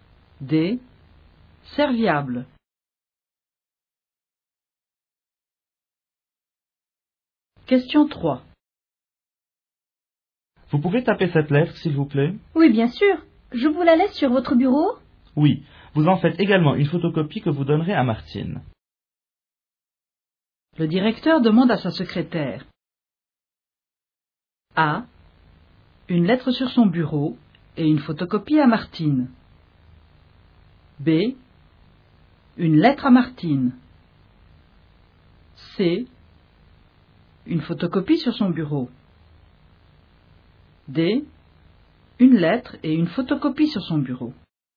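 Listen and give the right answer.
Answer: A: Une lettre sur son bureau et une photocopie à Martine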